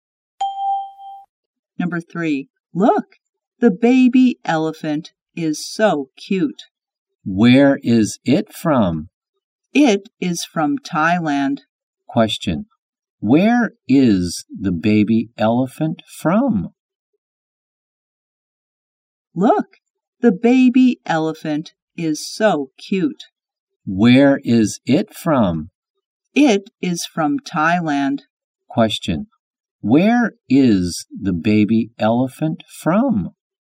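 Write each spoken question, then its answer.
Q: Where is the baby elephant from?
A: Thailand.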